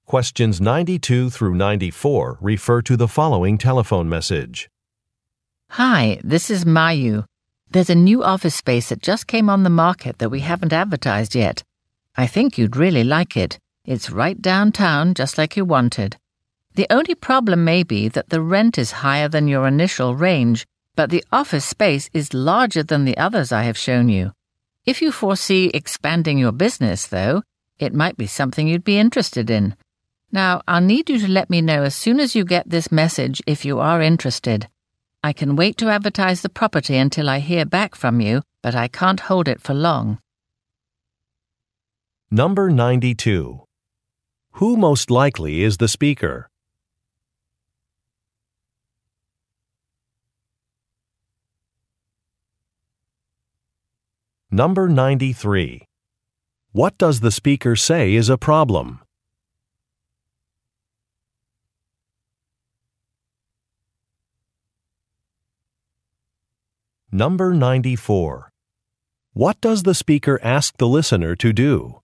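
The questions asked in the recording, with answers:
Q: Who most likely is the speaker?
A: A real estate agent

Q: What does the speaker say is a problem?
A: The rent is higher than the listener's initial range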